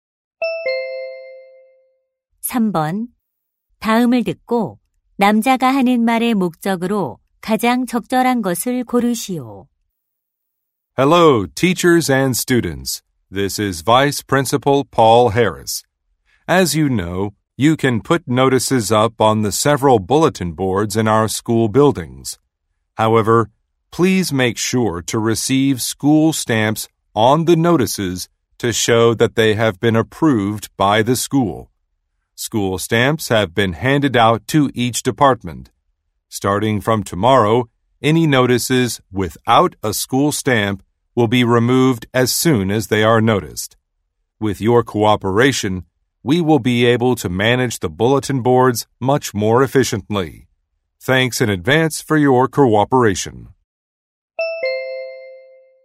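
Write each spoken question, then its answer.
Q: 다음을 듣고 남자가 하는 말의 목적으로 가장 적절한 것을 고르시오.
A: 게시물에 학교 도장을 받아 게시하도록 요청하려고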